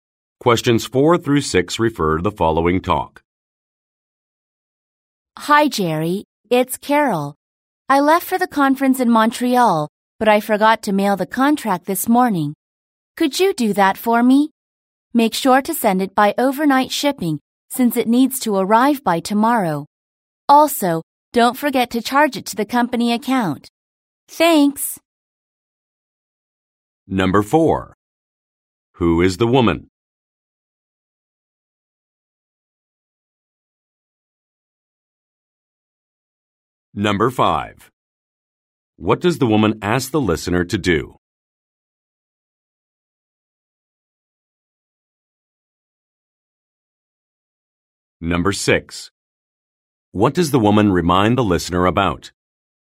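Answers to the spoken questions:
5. Mail the contract by overnight shipping.
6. To charge it to the company account.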